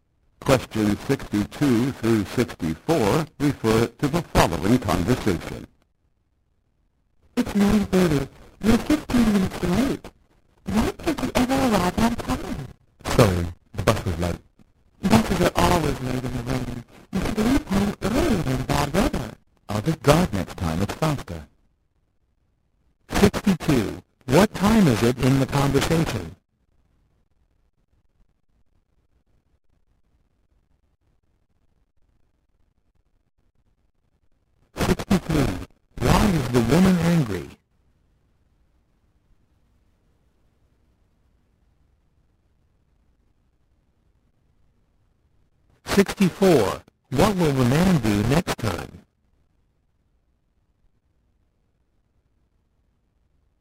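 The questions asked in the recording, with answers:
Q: What time is it in the conversation?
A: 9:30

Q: Why is the woman angry?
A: The man is 15 minutes late

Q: What will the man do next time?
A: Drive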